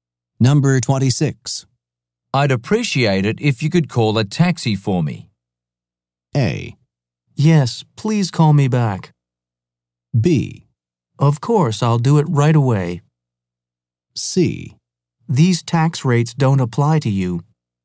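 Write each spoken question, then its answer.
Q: I'd appreciate it if you could call a taxi for me.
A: B: Of course, I'll do it right away.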